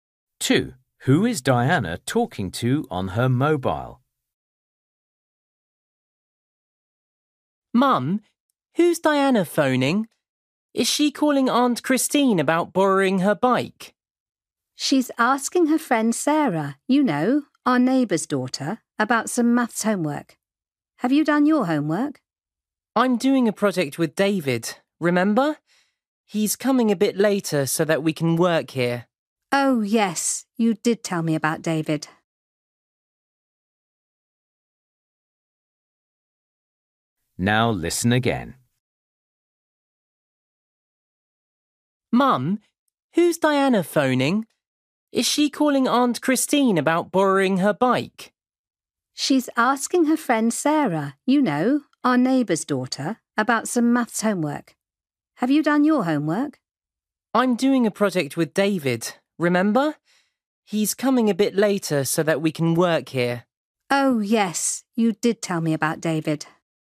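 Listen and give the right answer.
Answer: Her friend Sarah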